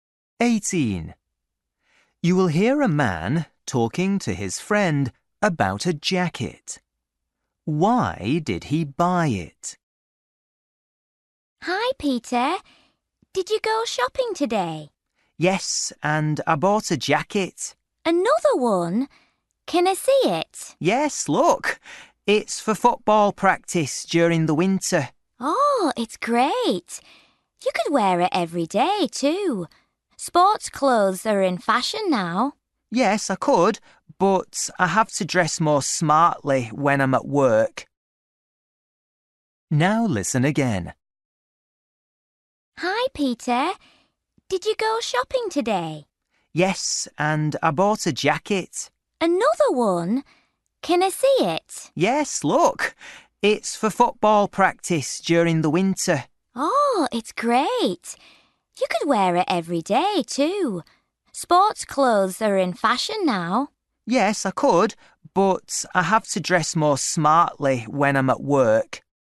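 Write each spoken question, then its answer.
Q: Why did he buy it?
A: For football practice in the winter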